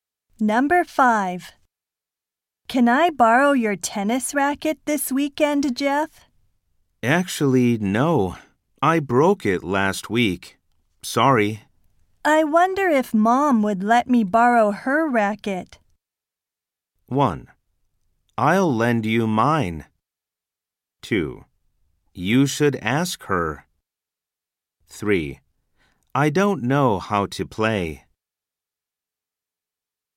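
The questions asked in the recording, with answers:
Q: I wonder if Mom would let me borrow her racket.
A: 2: You should ask her.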